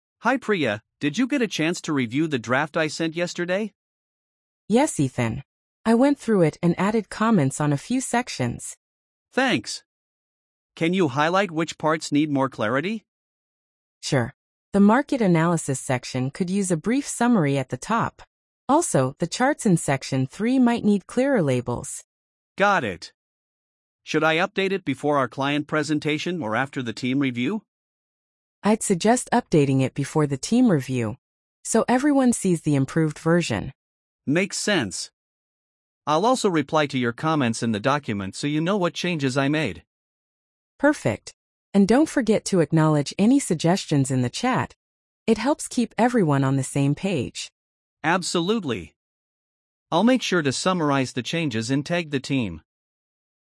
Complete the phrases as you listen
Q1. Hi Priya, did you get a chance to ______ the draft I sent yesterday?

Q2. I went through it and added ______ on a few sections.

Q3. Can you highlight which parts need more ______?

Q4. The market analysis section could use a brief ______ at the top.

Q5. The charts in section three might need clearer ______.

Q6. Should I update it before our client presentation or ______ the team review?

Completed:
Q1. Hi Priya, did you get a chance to review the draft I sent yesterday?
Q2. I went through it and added comments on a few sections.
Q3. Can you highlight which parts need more clarity?
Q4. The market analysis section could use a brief summary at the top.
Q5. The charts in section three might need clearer labels.
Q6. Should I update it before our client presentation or after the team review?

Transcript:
Ethan: Hi Priya, did you get a chance to review the draft I sent yesterday?
Priya: Yes, Ethan. I went through it and added comments on a few sections.
Ethan: Thanks! Can you highlight which parts need more clarity?
Priya: Sure. The market analysis section could use a brief summary at the top. Also, the charts in section three might need clearer labels.
Ethan: Got it. Should I update it before our client presentation or after the team review?
Priya: I'd suggest updating it before the team review, so everyone sees the improved version.
Ethan: Makes sense. I'll also reply to your comments in the document so you know what changes I made.
Priya: Perfect. And don't forget to acknowledge any suggestions in the chat — it helps keep everyone on the same page.
Ethan: Absolutely. I'll make sure to summarize the changes and tag the team.